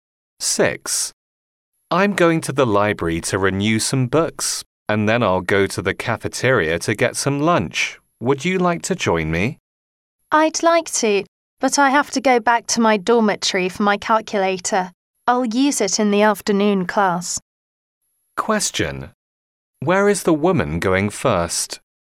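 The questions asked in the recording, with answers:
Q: Where is the woman going first?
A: Her dormitory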